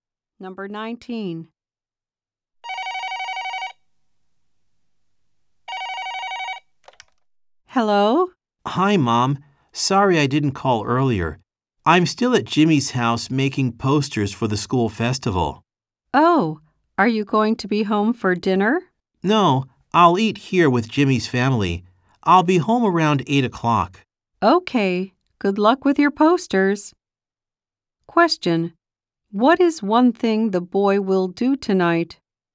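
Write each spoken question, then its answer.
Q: What is one thing the boy will do tonight?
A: Eat dinner with Jimmy's family.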